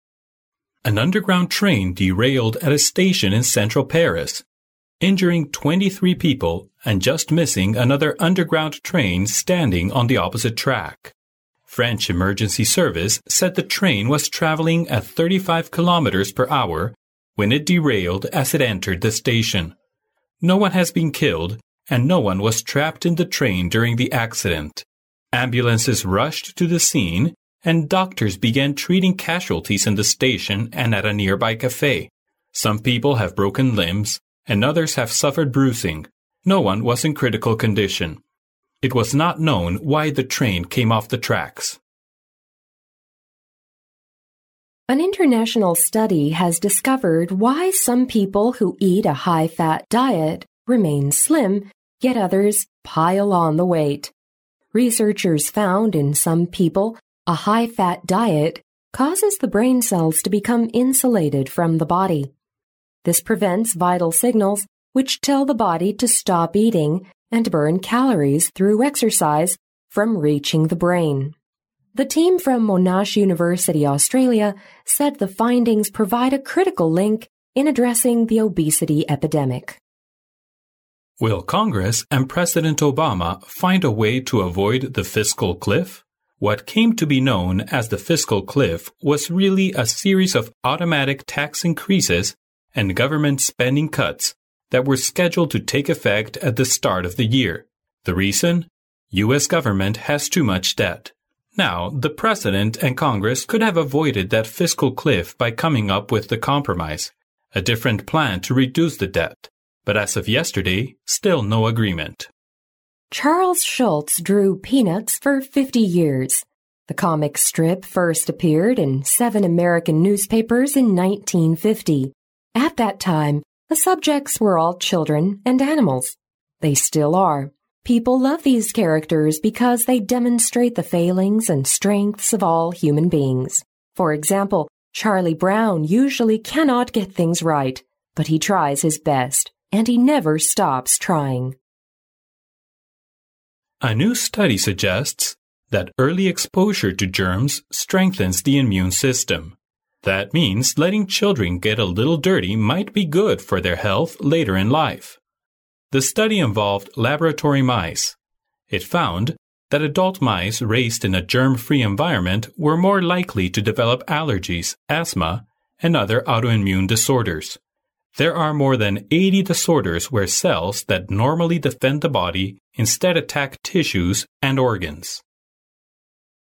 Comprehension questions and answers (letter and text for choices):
In this section, you will hear five short news items. After each item, which will be read only once, there will be a twenty-second pause. During the pause, read the question and the four choices marked A, B, C and D, and decide which is the best answer. Then mark the corresponding letter on the answer sheet with a single line through the centre.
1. Which of the following statements best describe the condition of the passengers?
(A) No one was hurt during the accident.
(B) Someone was killed during the accident.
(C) 23 people were trapped in the train.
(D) No one was fatally injured.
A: (D) No one was fatally injured.

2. Where is the Monash University located?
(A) Austria.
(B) Russia.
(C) Australia.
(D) America.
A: (C) Australia.

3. What problem is US government now faced with?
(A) How to reduce the Governmen's debt.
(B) How to cope with campus violence.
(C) How to raise tax on high incomes.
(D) How to avoid the fiscal cliff.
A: (D) How to avoid the fiscal cliff.

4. Who was Charles Schulz?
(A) He was a writer.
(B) He was a comic painter.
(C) He was a newspaper editor.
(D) He was a reporter.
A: (B) He was a comic painter.

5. How about letting children get a little dirty in life?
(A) It might be good for their health later in life.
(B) It might be harmful for children to form good habits.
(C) It is more likely to develop allergies and asthma.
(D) It is more likely to make children happy.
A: (A) It might be good for their health later in life.

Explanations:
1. 根据录音中的"No one had been killed and no one was trapped in the train during the accident"可知,没有人在这次事故中死亡。因此选D项。
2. 录音中最后一句提到,这个研究团队来自澳大利亚的莫纳什大学。因此选C项。
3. 录音中指出,财政悬崖是美国总统和国会共同面对的一大难题。因此选D项。
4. 根据录音中的描述"Charles Schulz drew"Peanuts"for fifty years. The comic strip first appeared in seven American newspapers in nineteen fifty"可知,Charles Schulz是一位漫画画家。因此选B项。

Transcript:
[听力原文] An underground train derailed at a station in central Pairs, injuring 23 people and just missing another underground train standing on the opposite track. French Emergency Services said the train was travelling at 35 kilometers per hour when it derailed as it entered the station. No one had been killed and no one was trapped in the train during the accident. Ambulances rushed to the scene and doctors began treating casualties in the station and at a nearby café. Some people have broken limbs, and others have suffered bruising. No one was in critical condition. It was not known why the train came off the tracks.
[听力原文] An international study has discovered why some people who eat a high-fat diet remain slim, yet others pile on the weight. Researchers found in some people a high-fat diet causes the brain cells to become insulated from the body. This prevents vital signals, which tell the body to stop eating and to burn calories through exercise, from reaching the brain. The team from Monash University, Australia, said the findings provide a critical link in addressing the obesity epidemic.
[听力原文] Will congress and President Obama find a way to avoid the fiscal cliff? What came to be known as the fiscal cliff was really a series of automatic tax increases and government spending cuts that were scheduled to take effect at the start of the year. The reason—U.S. Government has too much debt. Now, the president and Congress could have avoided that fiscal cliff by coming up with the compromise, a different plan to reduce the debt. But as of yesterday, still no agreement.
The comic strip first appeared in seven American newspapers in nineteen fifty. At that time, the subjects were all children and animals. They still are. People love these characters because they demonstrate the failings and strengths of all human beings. For example, Charlie Brown usually cannot get things right. But he tries his best. And he never stops trying.
The comic strip first appeared in seven American newspapers in nineteen fifty"可知,Charles Schulz是一位漫画画家。
A
[听力原文] A new study suggests that early exposure to germs strengthens the immune system. That means letting children get a little dirty might be good for their health later in life. The study involved laboratory mice. It found that adult mice raised in a germ-free environment were more likely to develop allergies, asthma and other autoimmune disorders. There are more than eighty disorders where cells that normally defend the body instead attack tissues and organs.